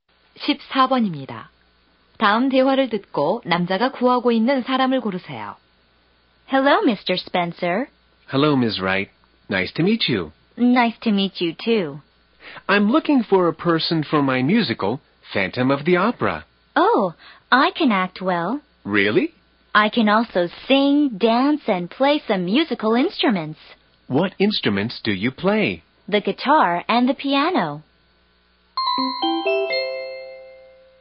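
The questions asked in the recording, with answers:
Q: 다음 대화를 듣고 남자가 구하고 있는 사람을 고르세요.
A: 뮤지컬 배우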